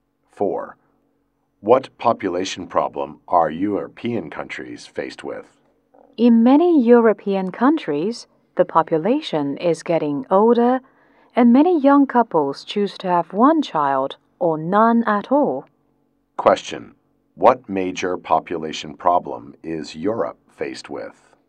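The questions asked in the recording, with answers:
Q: What major population problem is Europe faced with?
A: An ageing population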